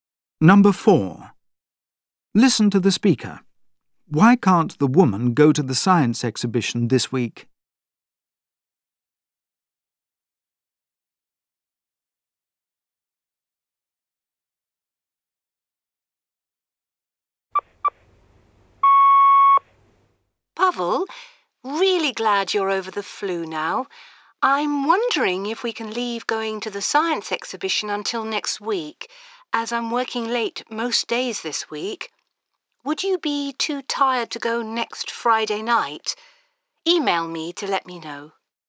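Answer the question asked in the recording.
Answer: She's working late most days this week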